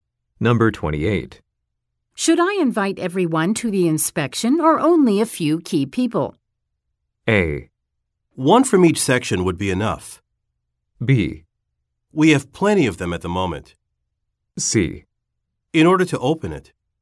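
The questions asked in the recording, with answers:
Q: Should I invite everyone to the inspection or only a few key people?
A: A: One from each section would be enough.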